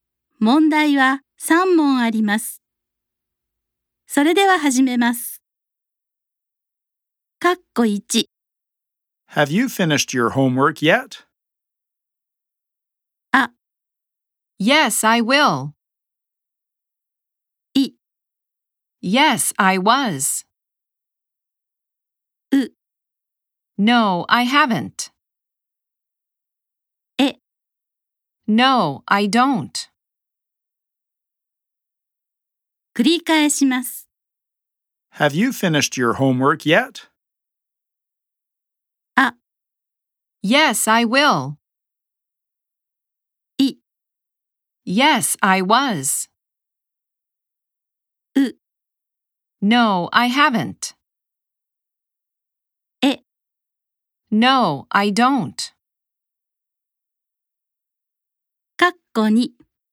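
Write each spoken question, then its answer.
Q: Have you finished your homework yet?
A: う: No, I haven't.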